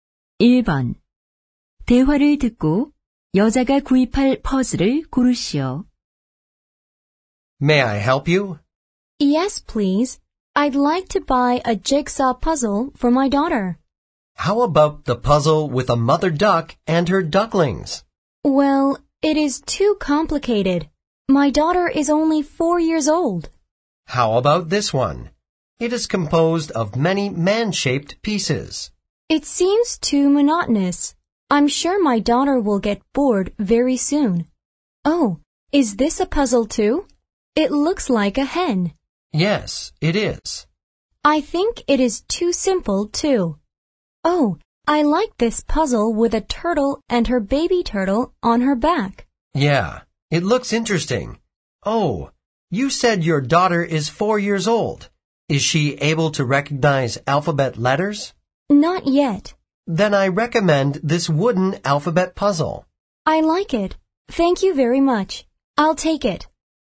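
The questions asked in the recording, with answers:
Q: 대화를 듣고 여자가 구입할 퍼즐을 고르시오.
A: 나무로 된 알파벳 퍼즐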